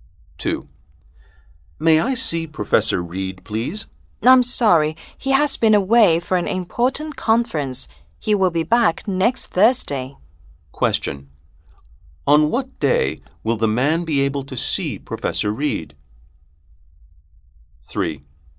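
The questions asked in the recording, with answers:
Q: On what day will the man be able to see Professor Reed?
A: Next Thursday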